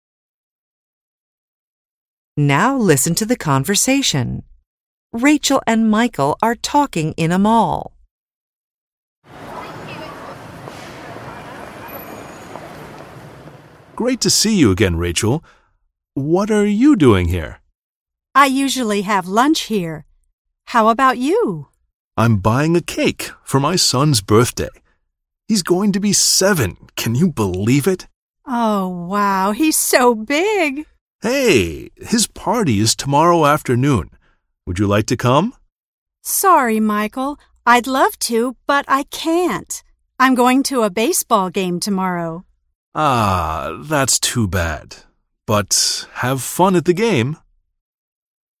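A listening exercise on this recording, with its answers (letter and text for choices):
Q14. Rachel and Michael ____.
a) are having lunch together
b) are buying gifts for their children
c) are busy tomorrow afternoon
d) are going to meet again tomorrow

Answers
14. c) are busy tomorrow afternoon

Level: BEGINNERS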